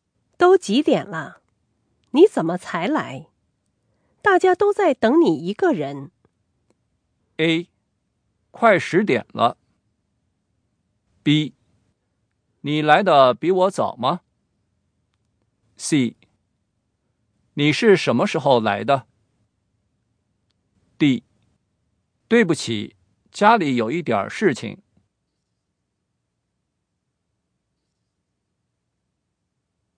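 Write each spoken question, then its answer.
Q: 都几点了?你怎么才来?大家都在等你一个人。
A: D: 对不起,家里有一点事情。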